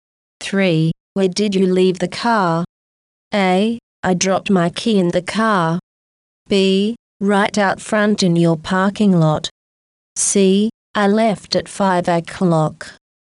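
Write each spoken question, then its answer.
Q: Where did you leave the car?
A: B: Right out front in your parking lot.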